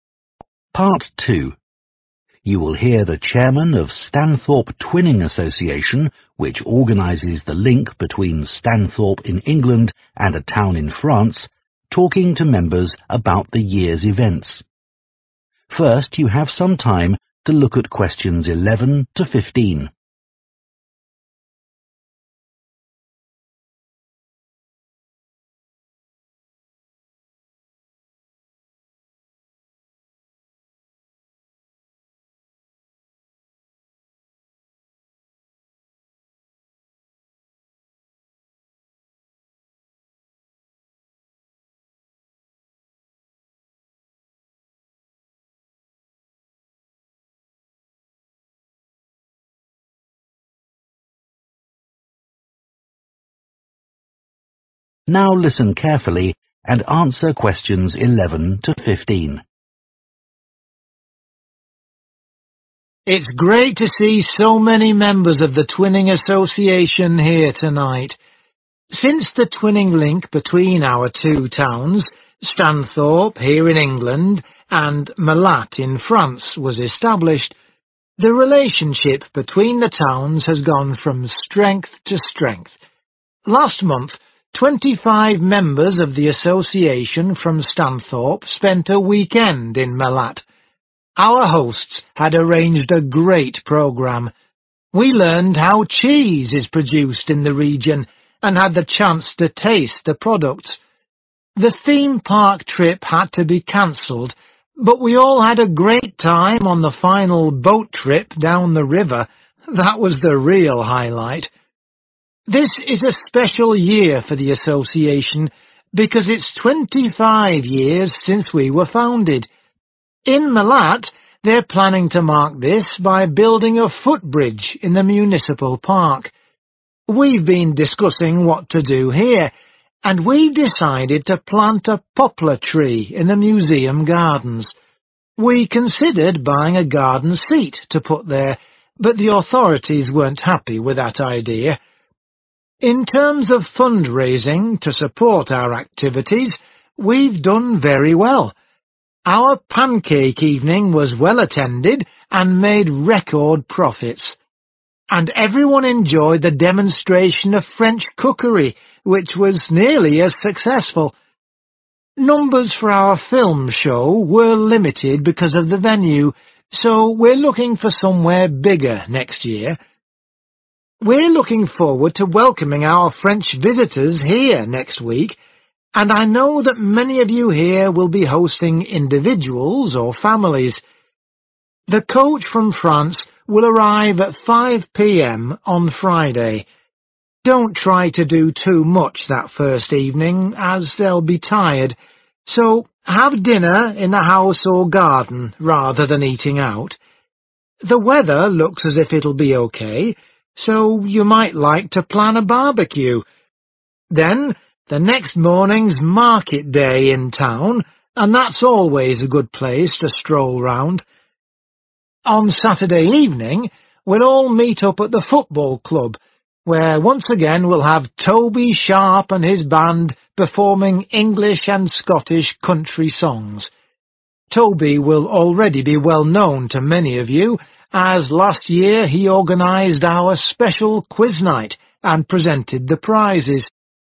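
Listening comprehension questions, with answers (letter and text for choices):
Choose the correct letter, A, B or C.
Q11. During the visit to Malatte, in France, members especially enjoyed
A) going to a theme park.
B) experiencing a river trip.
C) visiting a cheese factory.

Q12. What will happen in Stanthorpe to mark the 25th anniversary of the Twinning Association?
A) A tree will be planted.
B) A garden seat will be bought.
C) A footbridge will be built.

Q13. Which event raised most funds this year?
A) the film show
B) the pancake evening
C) the cookery demonstration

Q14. For the first evening with the French visitors host families are advised to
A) take them for a walk round the town.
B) go to a local restaurant.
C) have a meal at home.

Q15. On Saturday evening there will be the chance to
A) listen to a concertç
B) watch a match.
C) take part in a competition.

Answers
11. B) experiencing a river trip.
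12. A) A tree will be planted.
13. B) the pancake evening
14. C) have a meal at home.
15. A) listen to a concertç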